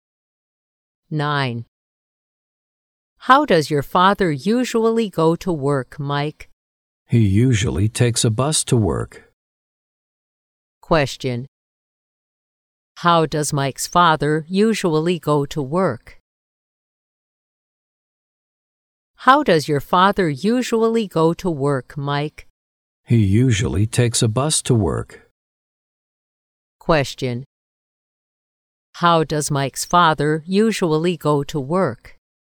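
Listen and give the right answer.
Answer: By bus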